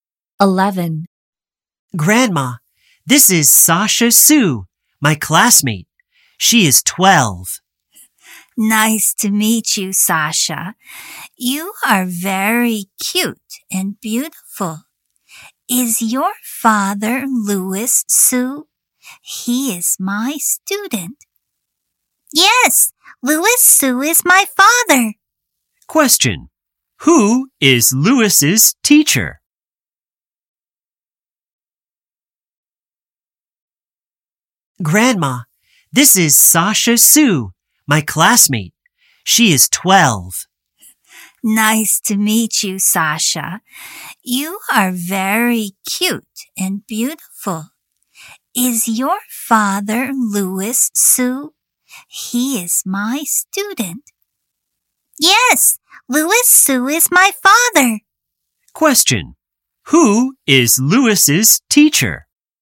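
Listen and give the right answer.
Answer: Sasha's classmate's grandma.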